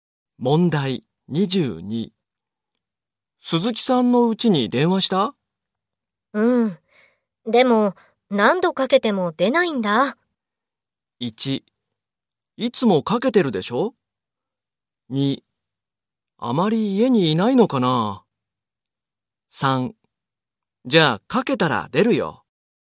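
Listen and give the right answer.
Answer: 2: あまり家にいないのかな?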